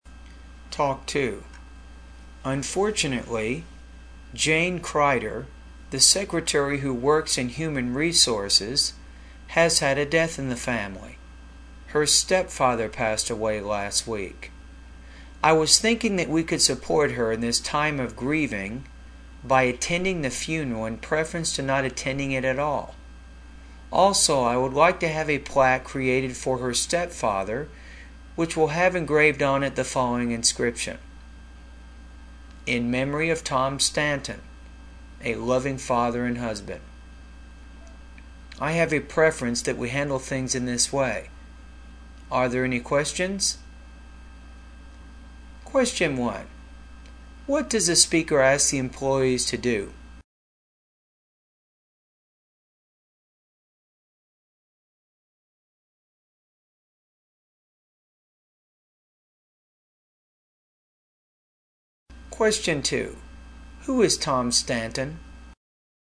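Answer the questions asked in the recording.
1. Attend the funeral of Jane's stepfather
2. Jane Kreider's stepfather, who passed away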